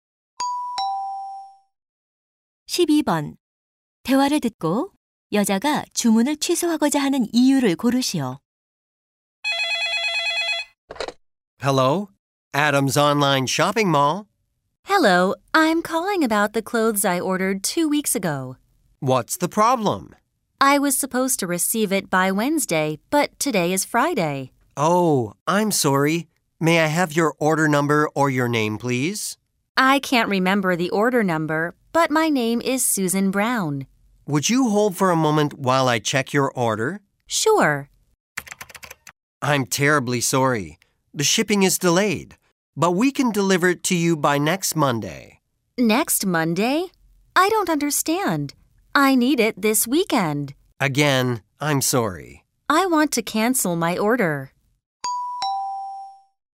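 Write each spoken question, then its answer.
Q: 대화를 듣고 여자가 주문을 취소하고자 하는 이유를 고르시오.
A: 배송이 지연되어 이번 주말까지 받을 수 없어서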